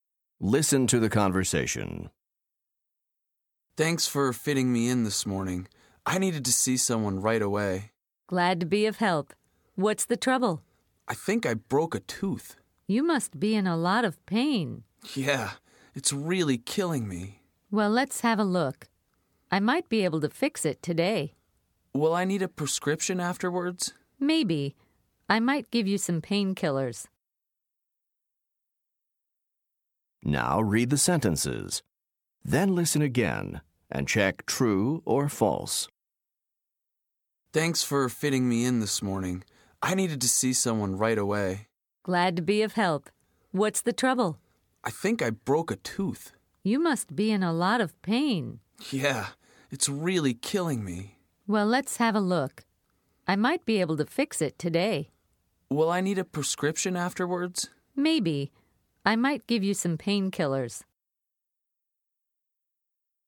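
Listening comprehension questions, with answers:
Listen to the conversation. Then choose True or False for each statement.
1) The dentist thinks the patient isn't in a lot of pain.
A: False

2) It's impossible for the dentist to fix the tooth today.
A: False

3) The dentist may give the patient some medicine.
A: True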